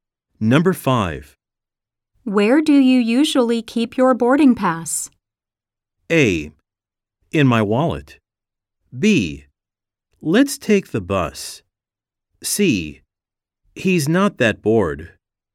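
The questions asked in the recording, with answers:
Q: Where do you usually keep your boarding pass?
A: A: In my wallet.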